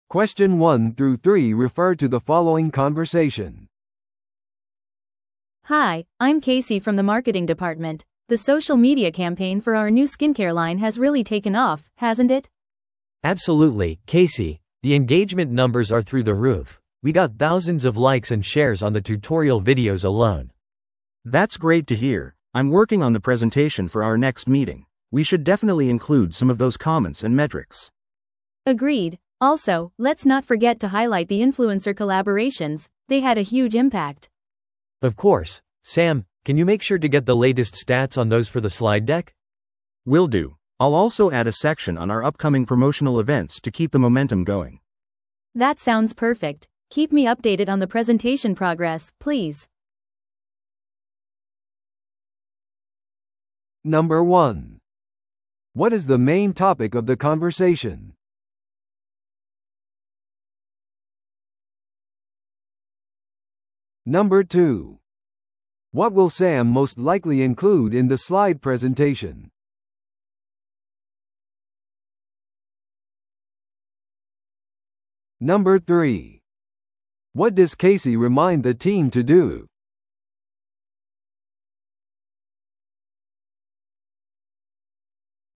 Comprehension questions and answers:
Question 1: What is the main topic of the conversation?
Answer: ソーシャルメディアキャンペーンの成功を分析する。

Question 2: What will Sam most likely include in the slide presentation?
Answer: 最新のエンゲージメント統計とインフルエンサーからのフィードバック。

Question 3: What does Casey remind the team to do?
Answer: インフルエンサーとのコラボレーションの結果を強調する。

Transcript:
A: Hi, I'm Casey from the marketing department. The social media campaign for our new skincare line has really taken off, hasn't it?
B: Absolutely, Casey. The engagement numbers are through the roof. We got thousands of likes and shares on the tutorial videos alone.
C: That's great to hear! I'm working on the presentation for our next meeting. We should definitely include some of those comments and metrics.
A: Agreed. Also, let's not forget to highlight the influencer collaborations – they had a huge impact.
B: Of course. Sam, can you make sure to get the latest stats on those for the slide deck?
C: Will do. I'll also add a section on our upcoming promotional events to keep the momentum going.
A: That sounds perfect. Keep me updated on the presentation progress, please.